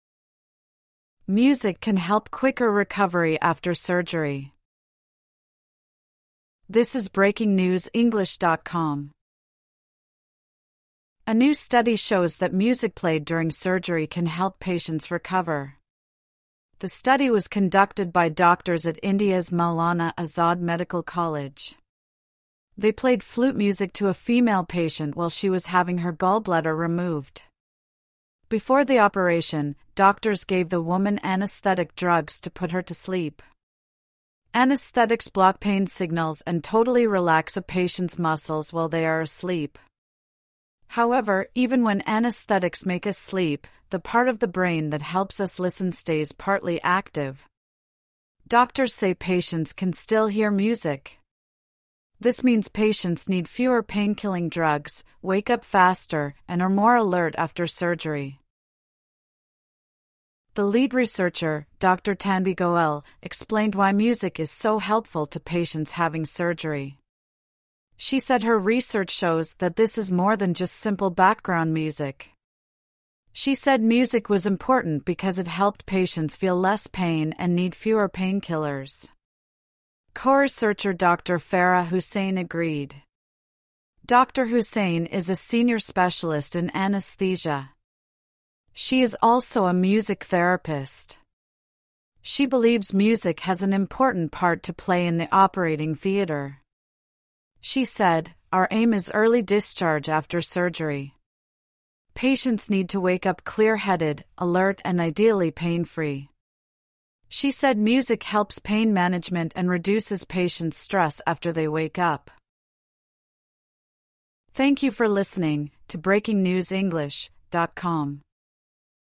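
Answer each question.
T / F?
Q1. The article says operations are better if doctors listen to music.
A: F

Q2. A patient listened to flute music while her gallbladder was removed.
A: T

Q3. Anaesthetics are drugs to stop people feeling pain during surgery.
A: T

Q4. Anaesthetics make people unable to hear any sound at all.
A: F

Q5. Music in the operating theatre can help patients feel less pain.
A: T

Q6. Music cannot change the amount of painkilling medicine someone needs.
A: F

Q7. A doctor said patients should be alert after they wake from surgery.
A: T

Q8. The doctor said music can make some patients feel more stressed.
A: F

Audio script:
Music can help quicker recovery after surgery
A new study shows that music played during surgery can help patients recover. The study was conducted by doctors at India's Maulana Azad Medical College. They played flute music to a female patient while she was having her gallbladder removed. 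Before the operation, doctors gave the woman anaesthetic drugs to put her to sleep. Anaesthetics block pain signals and totally relax a patient's muscles while they are asleep. However, even when anaesthetics make us sleep, the part of the brain that helps us listen stays partly active. Doctors say patients can still hear music. This means patients need fewer painkilling drugs, wake up faster, and are more alert after surgery.
The lead researcher, Dr Tanvi Goel, explained why music is so helpful to patients having surgery. She said her research shows "that this is more than just simple background music". She said music was important because it helped patients feel less pain and need fewer painkillers. Co-researcher Dr Farah Husain agreed. Dr Husain is a senior specialist in anaesthesia. She is also a music therapist. She believes music has an important part to play in the operating theatre. 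She said: "Our aim is early discharge after surgery. Patients need to wake up clear-headed, alert... and ideally pain-free." She said music helps pain management and reduces patients' stress after they wake up.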